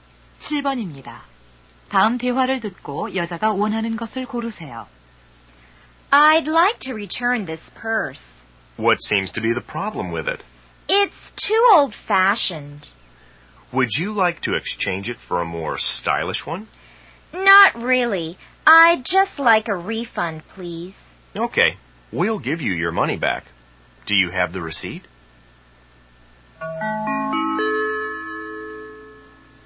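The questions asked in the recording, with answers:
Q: 다음 대화를 듣고 여자가 원하는 것을 고르세요.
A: 환불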